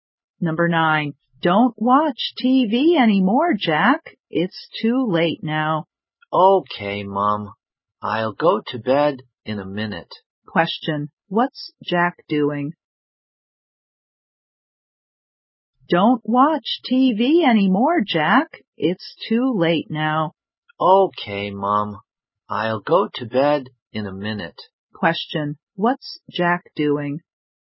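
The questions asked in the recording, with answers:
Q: Question. What's Jack doing?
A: Watching TV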